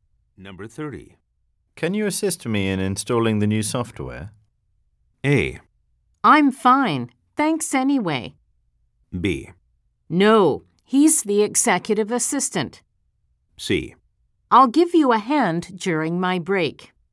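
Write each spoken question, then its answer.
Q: Can you assist me in installing the new software?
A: C: I'll give you a hand during my break.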